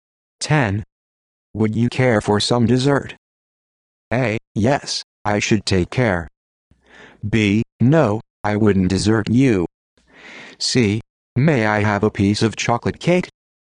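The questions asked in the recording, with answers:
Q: Would you care for some dessert?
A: C: May I have a piece of chocolate cake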